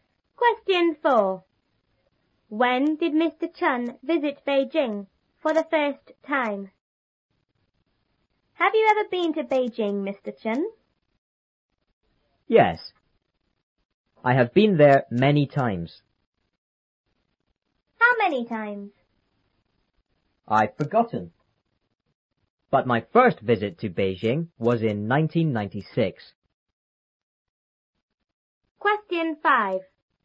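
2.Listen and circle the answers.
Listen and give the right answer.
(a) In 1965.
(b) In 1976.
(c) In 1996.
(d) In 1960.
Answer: (c) In 1996.

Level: 初中英语广州版3B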